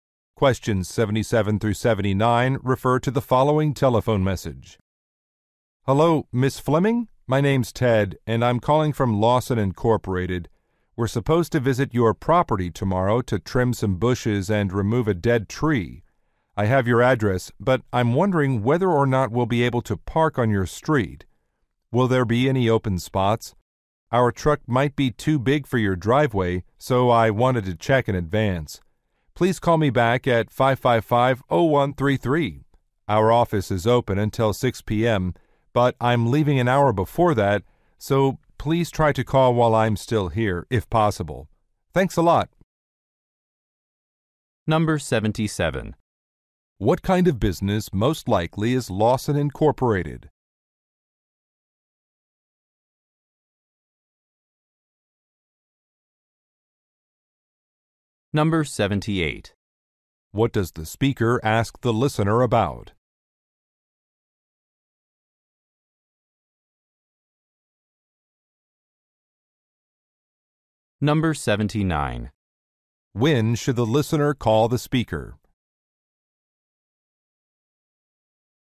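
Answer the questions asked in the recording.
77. A landscaping company
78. Whether there is parking on the street
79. Before 5 p.m.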